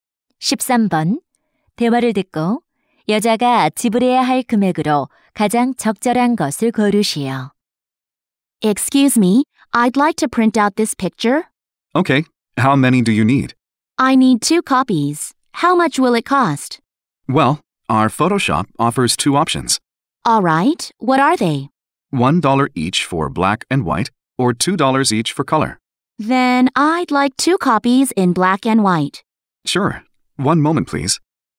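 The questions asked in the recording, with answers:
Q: 대화를 듣고 여자가 지불해야 할 금액으로 가장 적절한 것을 고르시오.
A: 2달러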